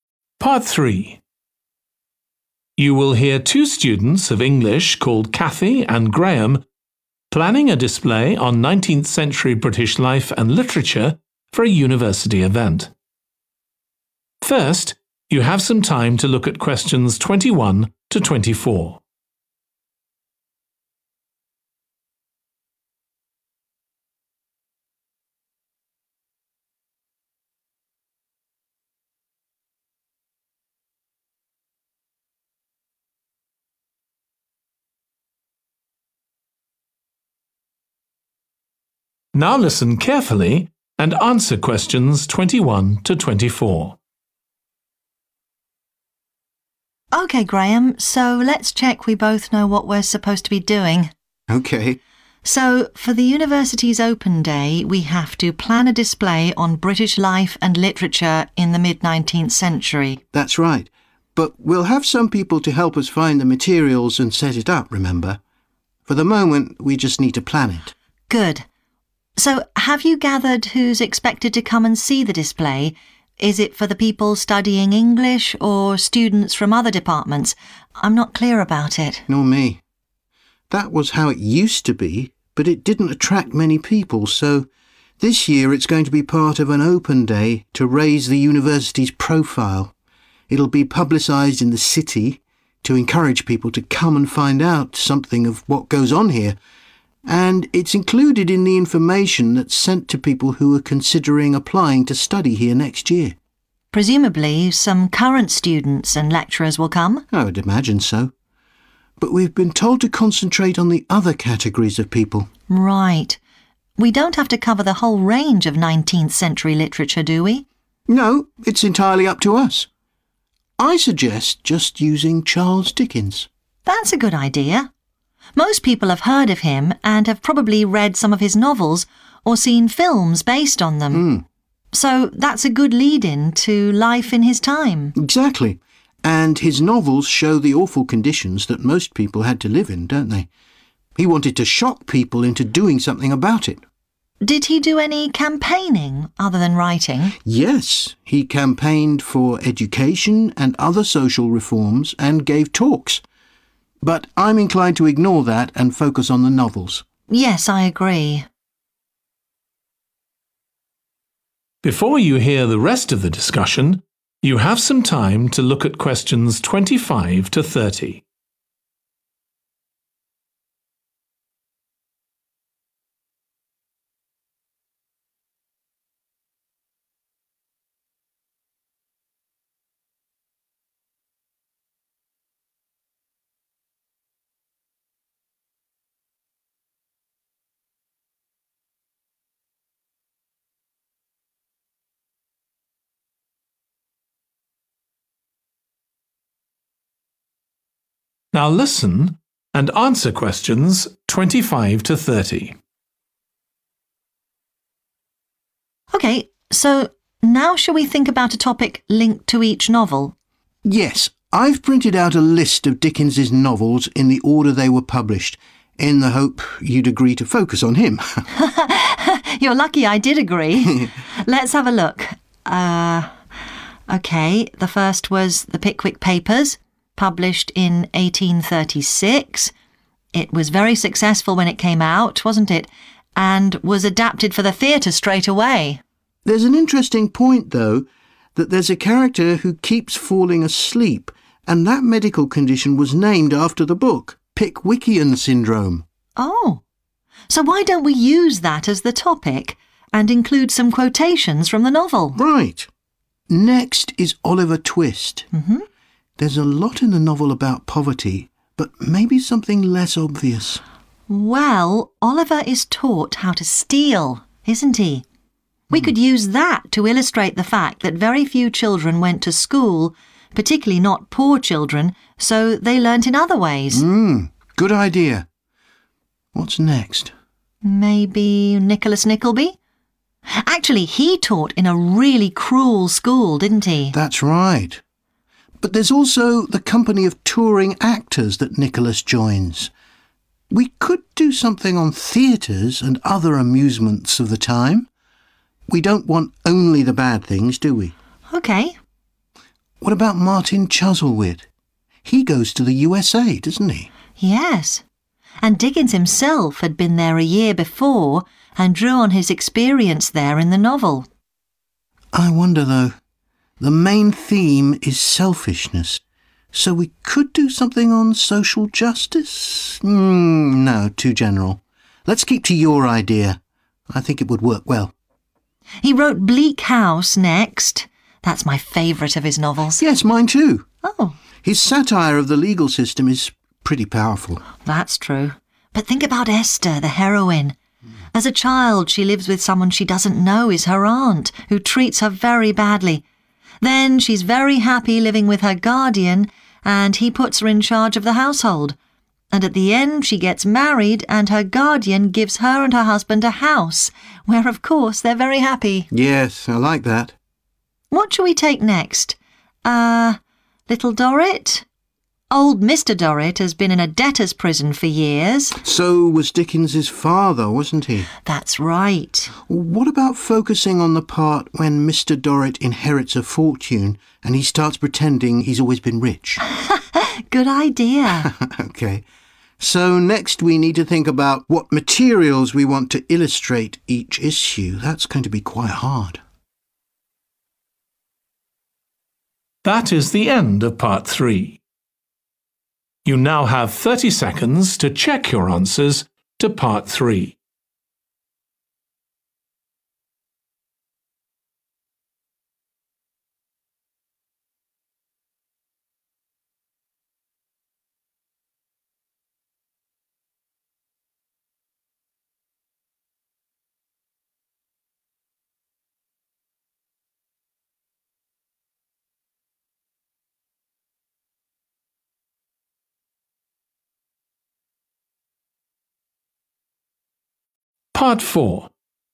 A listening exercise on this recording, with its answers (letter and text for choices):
Choose TWO letters, A-E.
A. poverty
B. education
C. Dickens's travels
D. entertainment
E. crime and the law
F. wealth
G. medicine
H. a woman's life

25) The Pickwick Papers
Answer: G. medicine

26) Oliver Twist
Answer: B. education

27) Nicholas Nickleby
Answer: D. entertainment

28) Martin Chuzzlewit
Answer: C. Dickens's travels

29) Bleak House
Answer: H. a woman's life

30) Little Dorrit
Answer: F. wealth